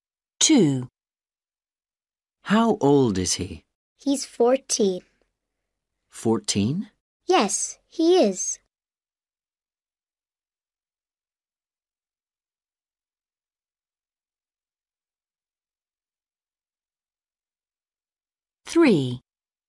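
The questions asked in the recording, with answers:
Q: How old is he?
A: 14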